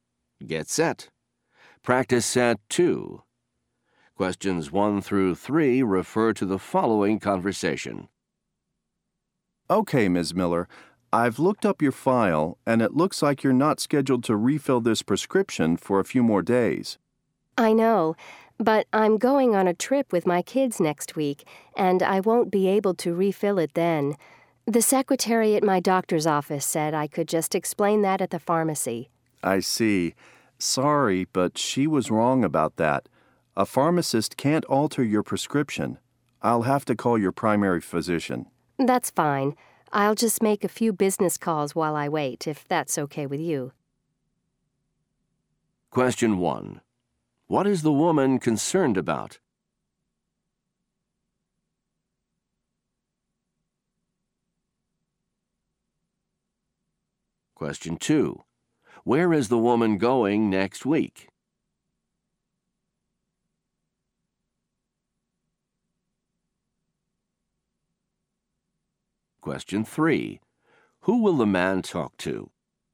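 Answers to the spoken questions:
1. Refilling her prescription early before her trip
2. On a trip with her kids
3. The woman's primary physician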